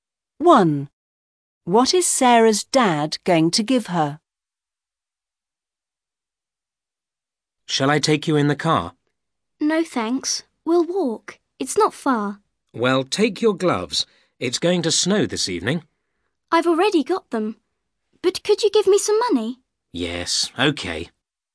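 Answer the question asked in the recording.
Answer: Money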